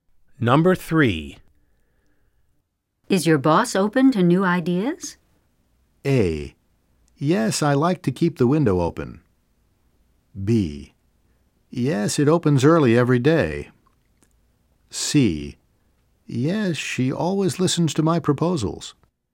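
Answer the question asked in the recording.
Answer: C: Yes, she always listens to my proposals.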